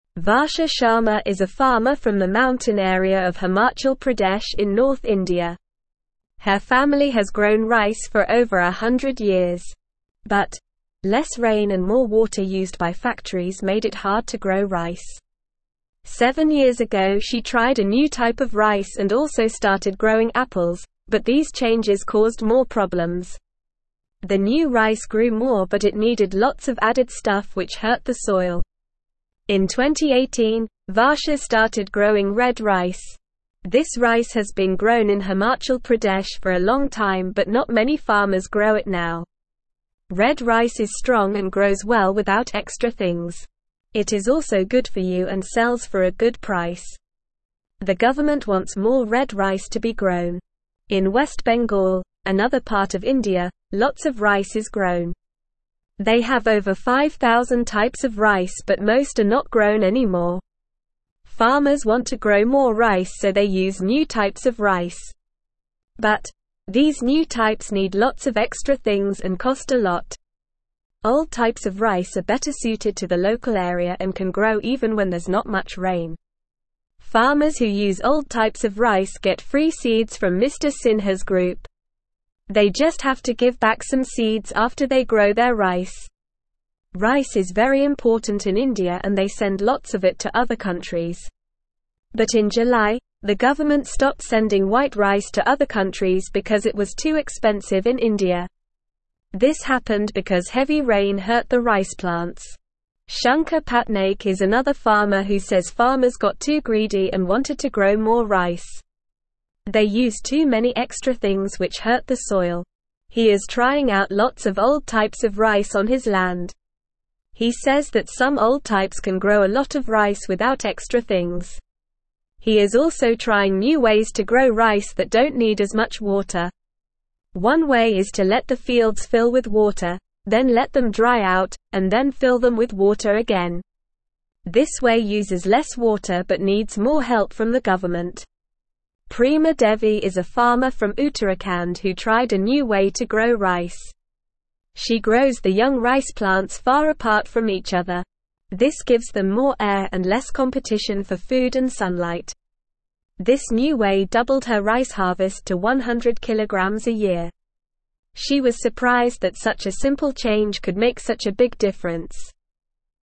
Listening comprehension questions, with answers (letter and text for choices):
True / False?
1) Varsha Sharma is a farmer from the desert area of India.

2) Varsha started growing red rice in 2018.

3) The government doesn't want more red rice to be grown.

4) In West Bengal, they have over 10,000 types of rice.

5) Old types of rice can grow even when there's not much rain.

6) The government stopped sending white rice to other countries because it was too cheap in India.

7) Shankar Patnaik is trying out lots of old types of rice on his land.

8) Prema Devi's new way of growing rice made her harvest less.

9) Where is Varsha Sharma from?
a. West Bengal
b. Uttarakhand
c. Himachal Pradesh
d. Southern India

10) What did Varsha start growing in 2018?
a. Apples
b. Red rice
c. White rice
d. New type of rice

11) What is the problem with the new types of rice?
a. They are too expensive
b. They grow too much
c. They need lots of extra things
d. They are not good for health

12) Who gives free seeds to farmers who use old types of rice?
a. The government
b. Mr Sinha's group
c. Varsha Sharma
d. Shankar Patnaik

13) Why did the government stop sending white rice to other countries in July?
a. Because it was too expensive in India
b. Because they wanted to grow more red rice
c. Because it was not good for health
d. Because they did not have enough rice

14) What is Shankar Patnaik trying on his land?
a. New types of rice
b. Old types of rice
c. Red rice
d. White rice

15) What new way of growing rice is Shankar Patnaik trying?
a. Growing rice far apart from each other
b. Letting the fields fill with water, then dry out, and then fill them with water again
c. Using more extra things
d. Growing rice in the mountains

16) How much rice does Prema Devi harvest a year with her new way of growing rice?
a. 50kg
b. 200kg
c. 150kg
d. 100kg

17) Varsha Sharma is a (1)______ from the mountain area of Himachal Pradesh in north India.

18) The government wants more red rice to be (2)______.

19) They just have to give back some seeds after they grow their (3)______.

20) This happened because heavy rain hurt the rice (4)______.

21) This way uses less water but needs more help from the (5)______.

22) She was surprised that such a simple change could make such a big (6)______.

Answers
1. False
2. True
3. False
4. False
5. True
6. False
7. True
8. False
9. c. Himachal Pradesh
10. b. Red rice
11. c. They need lots of extra things
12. b. Mr Sinha's group
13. a. Because it was too expensive in India
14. b. Old types of rice
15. b. Letting the fields fill with water, then dry out, and then fill them with water again
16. d. 100kg
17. farmer
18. grown
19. rice
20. plants
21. government
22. difference

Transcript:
Varsha Sharma is a farmer from the mountain area of Himachal Pradesh in north India. Her family has grown rice for over a hundred years. But, less rain and more water used by factories made it hard to grow rice. Seven years ago she tried a new type of rice and also started growing apples, but these changes caused more problems. The new rice grew more but it needed lots of added stuff which hurt the soil.
In 2018, Varsha started growing red rice. This rice has been grown in Himachal Pradesh for a long time but not many farmers grow it now. Red rice is strong and grows well without extra things. It is also good for you and sells for a good price. The government wants more red rice to be grown.
In West Bengal, another part of India, lots of rice is grown. They have over 5,000 types of rice but most are not grown anymore. Farmers want to grow more rice so they use new types of rice. But, these new types need lots of extra things and cost a lot.
Old types of rice are better suited to the local area and can grow even when there's not much rain. Farmers who use old types of rice get free seeds from Mr Sinha's group. They just have to give back some seeds after they grow their rice.
Rice is very important in India and they send lots of it to other countries. But in July, the government stopped sending white rice to other countries because it was too expensive in India. This happened because heavy rain hurt the rice plants.
Shankar Patnaik is another farmer who says farmers got too greedy and wanted to grow more rice. They used too many extra things which hurt the soil. He is trying out lots of old types of rice on his land. He says that some old types can grow a lot of rice without extra things.
He is also trying new ways to grow rice that don't need as much water. One way is to let the fields fill with water, then let them dry out, and then fill them with water again. This way uses less water but needs more help from the government.
Prema Devi is a farmer from Uttarakhand who tried a new way to grow rice. She grows the young rice plants far apart from each other. This gives them more air and less competition for food and sunlight. This new way doubled her rice harvest to 100kg a year. She was surprised that such a simple change could make such a big difference.
Original news source: Back to the future for India's rice farmers (BBC)
Encourage them to use simple sentences and vocabulary that they are comfortable with.
Instructions: Ask students to draw a scene from the article, such as Varsha Sharma trying to grow red rice, or Prema Devi spacing out her young rice plants. Then, have them describe their picture to the class using simple sentences, such as "This is Varsha. She is growing red rice." or "This is Prema.
4. In West Bengal, what is the problem with new types of rice?
7. What is Shankar Patnaik doing to grow more rice without hurting the soil?
Listen and Fill in the Gaps:

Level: Level 1